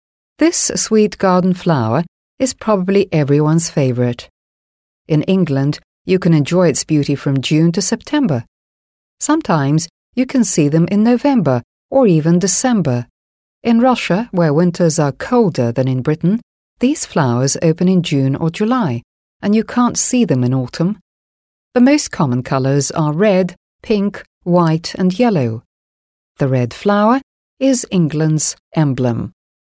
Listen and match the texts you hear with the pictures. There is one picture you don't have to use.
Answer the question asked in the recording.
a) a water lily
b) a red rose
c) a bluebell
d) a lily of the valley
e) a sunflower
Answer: b) a red rose

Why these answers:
Здесь ответ помогает найти фраза «The red flower is England's emblem» (Красный цветок — эмблема Англии). Это общеизвестный факт о розе.

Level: 7 класс